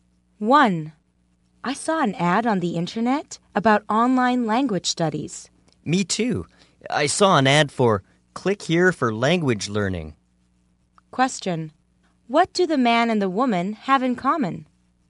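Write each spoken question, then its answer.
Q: What do the man and the woman have in common?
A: They both saw an ad about online language learning (Click Here for Language Learning).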